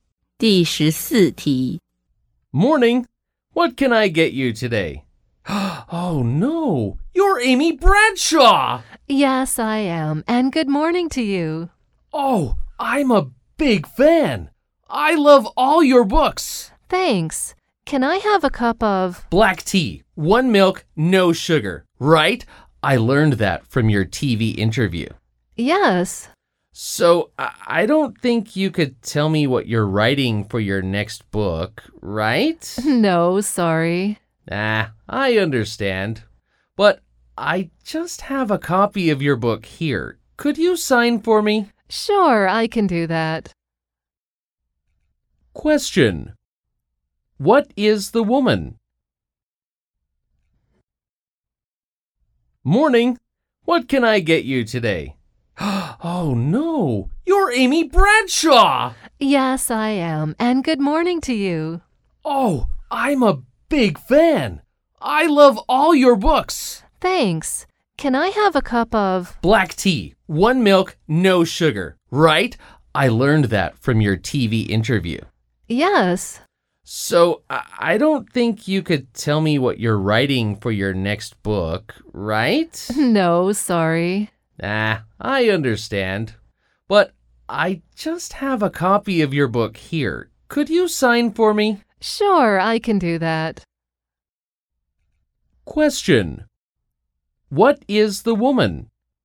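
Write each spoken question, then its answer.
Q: What is the woman?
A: A writer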